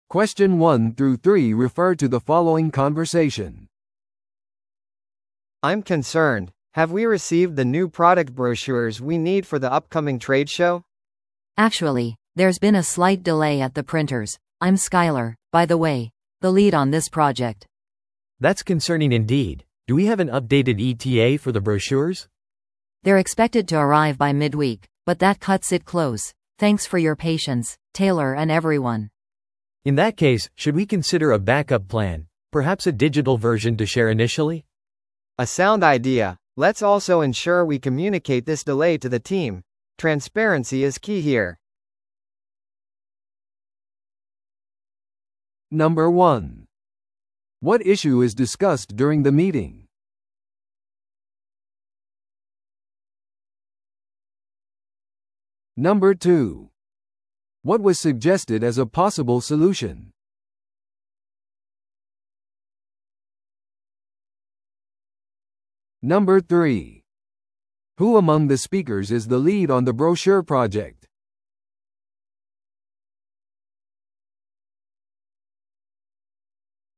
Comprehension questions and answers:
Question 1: What issue is discussed during the meeting?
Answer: 商品パンフレットの受け取りが遅れていること。

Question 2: What was suggested as a possible solution?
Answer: パンフレットのデジタル版を用意する。

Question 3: Who among the speakers is the lead on the brochure project?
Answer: 印刷所での遅れを認めた話し手。

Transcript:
A: I'm concerned. Have we received the new product brochures we need for the upcoming trade show?
B: Actually, there's been a slight delay at the printers. I'm Skyler, by the way, the lead on this project.
C: That's concerning indeed. Do we have an updated ETA for the brochures?
B: They're expected to arrive by midweek, but that cuts it close. Thanks for your patience, Taylor and everyone.
C: In that case, should we consider a backup plan, perhaps a digital version to share initially?
A: A sound idea. Let's also ensure we communicate this delay to the team; transparency is key here.